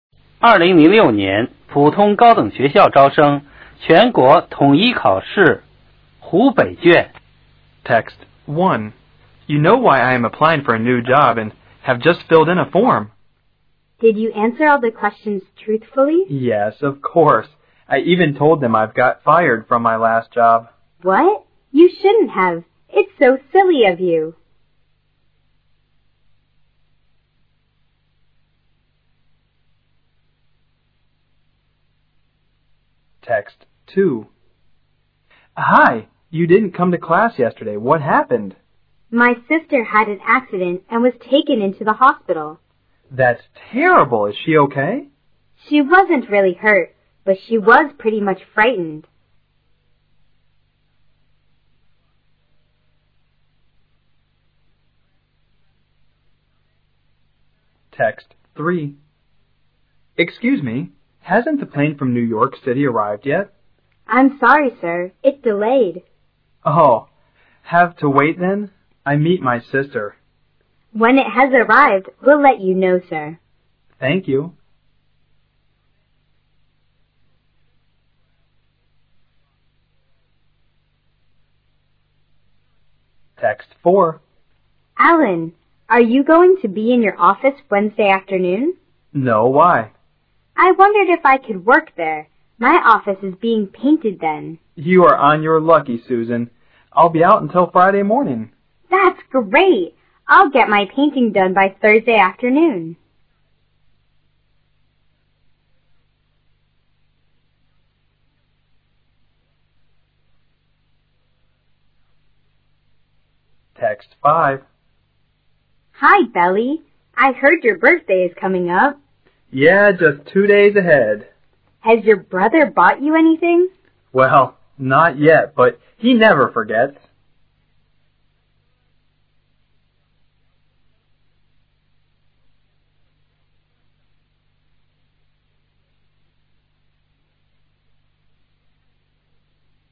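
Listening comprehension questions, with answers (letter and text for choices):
听下面5段对话。每段对话后有一个小题,从题中所给的A、B、C三个选项中选出最佳选项,并标志在试卷的相庆位置。听完每段对话后,你都有10秒钟的时间来回答有关小题和阅读下一小题。每段对话仅读一遍。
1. What kind of person is the much?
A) He is friendly.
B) He is honest.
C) He is funny.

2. What was about the womans sister?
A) She didn't go to school.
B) She had an accident.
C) She was badly butl.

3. What is the man doing at the airport?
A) Answering a passengers question.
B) Leaving for New York City.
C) Waiting for his sister.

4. What did the woman ask to man?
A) whether he could let her use his office.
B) Whether he had to work on the weekend.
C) Whether he could help her wih her projed.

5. Whar does the man mean?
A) His brother is coming to celebrate his birrhday.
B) His brother will give him a birthday present.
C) His brother never forgets his own birthday.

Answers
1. B) He is honest.
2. B) She had an accident.
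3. C) Waiting for his sister.
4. A) whether he could let her use his office.
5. B) His brother will give him a birthday present.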